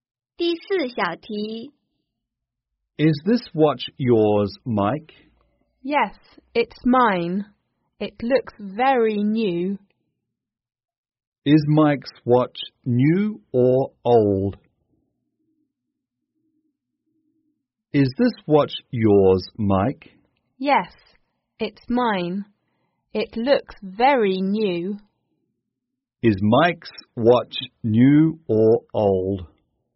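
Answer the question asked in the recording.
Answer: New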